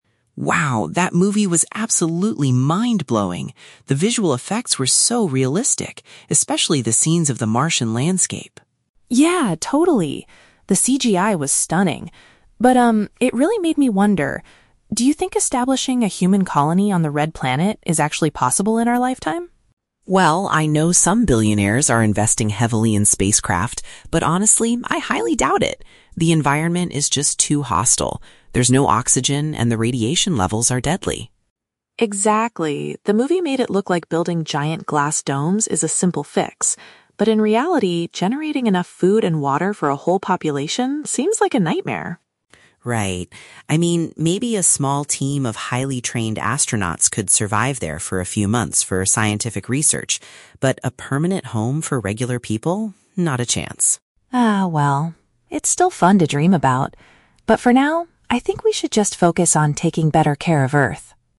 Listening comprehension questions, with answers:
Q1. Why did the boy enjoy the sci-fi movie?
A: Because of its impressive computer-generated imagery.

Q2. How does the boy feel about regular people living on Mars?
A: He believes it is highly unlikely due to dangerous conditions.

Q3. According to the girl, what was misleading about the film?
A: It made the construction of living habitats look too easy.

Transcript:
Boy (Tom): Wow, that movie was absolutely mind-blowing! The visual effects were so realistic, especially the scenes of the Martian landscape.
Girl (Lisa): Yeah, totally! The CGI was stunning. But, um, it really made me wonder... do you think establishing a human colony on the Red Planet is actually possible in our lifetime?
Boy (Tom): Well, I know some billionaires are investing heavily in spacecraft, but honestly, I highly doubt it. The environment is just too hostile. There's no oxygen, and the radiation levels are deadly.
Girl (Lisa): Exactly. The movie made it look like building giant glass domes is a simple fix. But in reality, generating enough food and water for a whole population seems like a nightmare.
Boy (Tom): Right. I mean, maybe a small team of highly trained astronauts could survive there for a few months for scientific research. But a permanent home for regular people? Not a chance.
Girl (Lisa): Ah, well. It's still fun to dream about. But for now, I think we should just focus on taking better care of Earth.